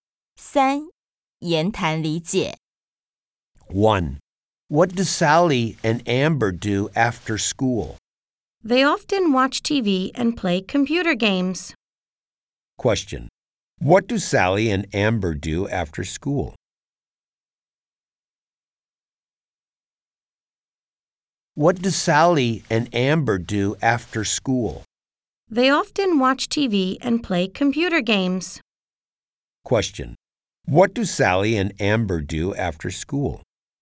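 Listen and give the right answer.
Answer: They often watch TV and play computer games.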